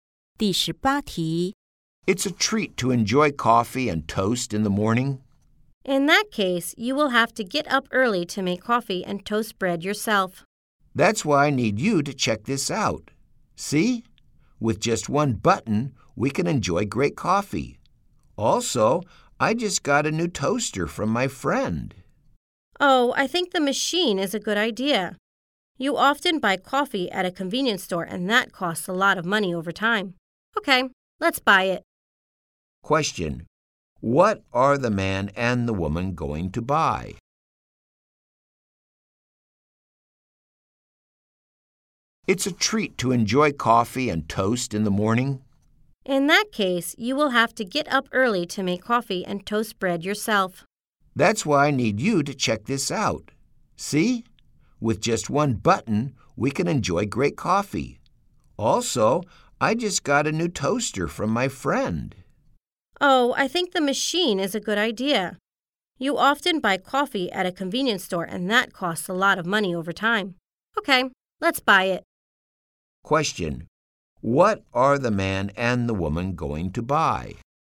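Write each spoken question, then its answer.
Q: Question: What are the man and the woman going to buy?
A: A coffee machine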